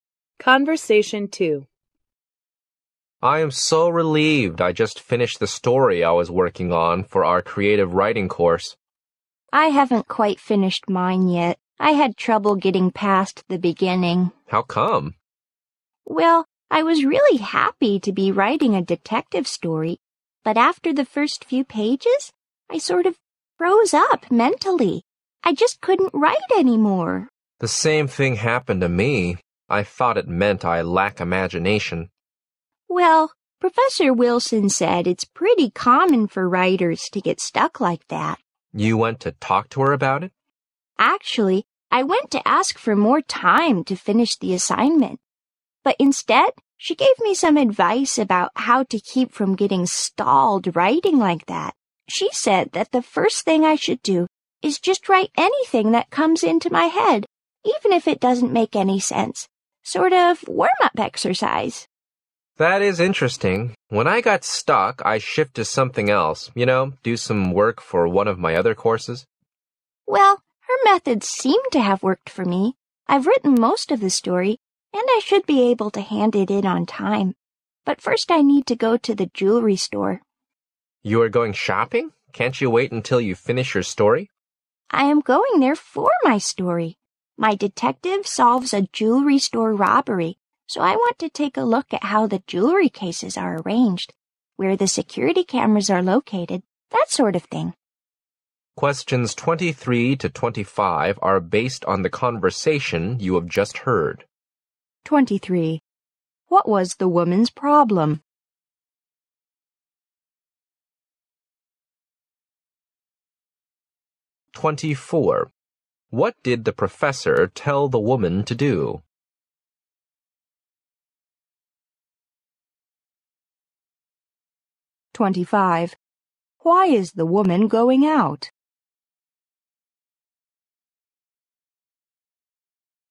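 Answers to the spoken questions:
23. She got stuck and couldn't continue writing her story
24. Write anything that comes into her head as a warm-up
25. To look at a jewelry store for details for her story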